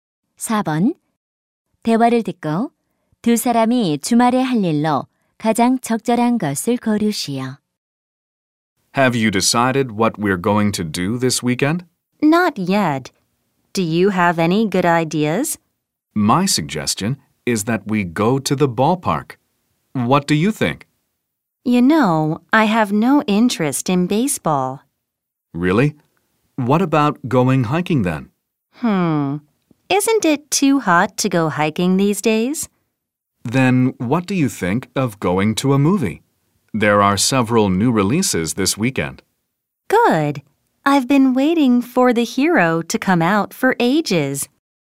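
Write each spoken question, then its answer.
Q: 대화를 듣고 두 사람이 주말에 할 일로 가장 적절한 것을 고르시오.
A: 영화 보러 가기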